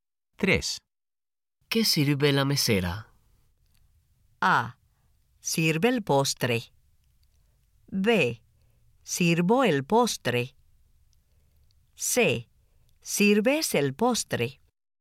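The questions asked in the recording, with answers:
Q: ¿Qué sirve la mesera?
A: A: Sirve el postre.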